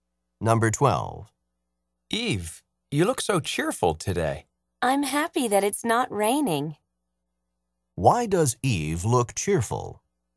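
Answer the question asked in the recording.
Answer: Because it's not raining.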